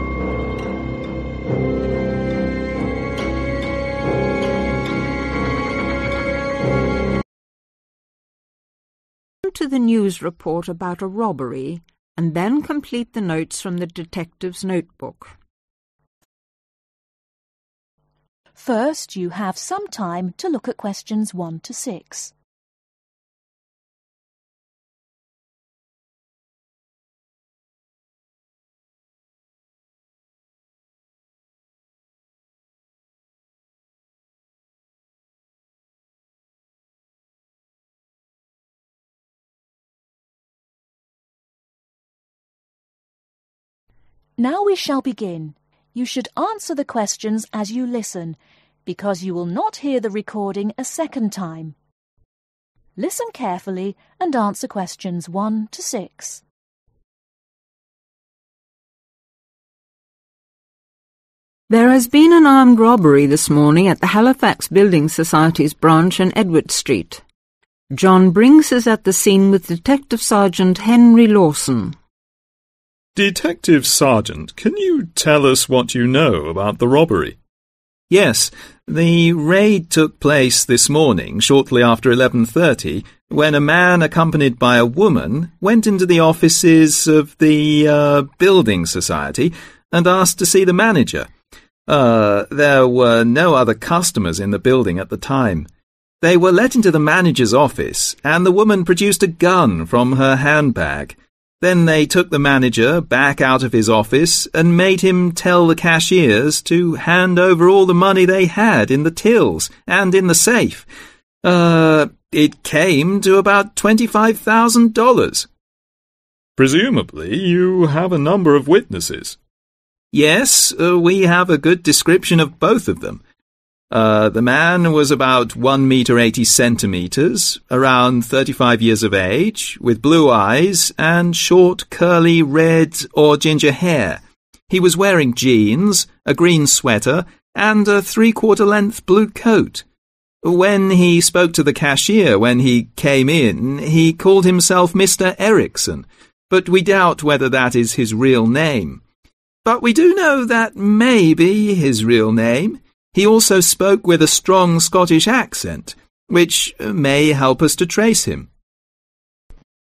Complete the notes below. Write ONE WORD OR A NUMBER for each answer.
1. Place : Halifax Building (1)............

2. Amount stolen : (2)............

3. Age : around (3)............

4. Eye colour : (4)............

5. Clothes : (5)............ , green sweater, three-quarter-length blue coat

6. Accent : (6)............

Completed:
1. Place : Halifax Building Society
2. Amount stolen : 25000
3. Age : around 35
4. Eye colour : Blue
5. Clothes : Jeans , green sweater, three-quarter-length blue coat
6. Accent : Scottish